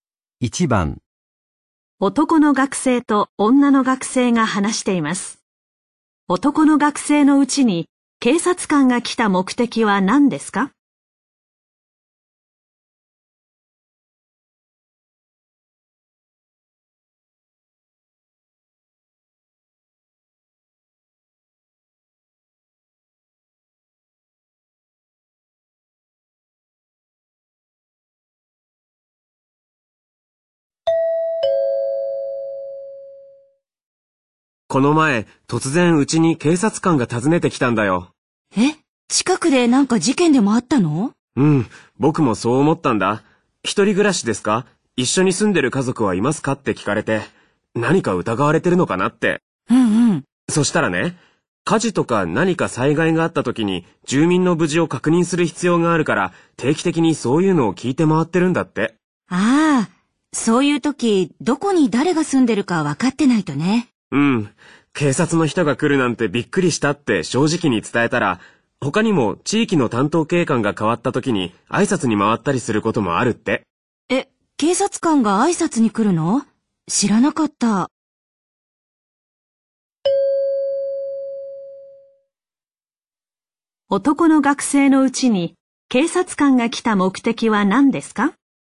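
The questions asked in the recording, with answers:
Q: 男の学生のうちに警察官が来た目的は何ですか?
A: 災害時に住民の無事を確認するため、住んでいる人を調べに来た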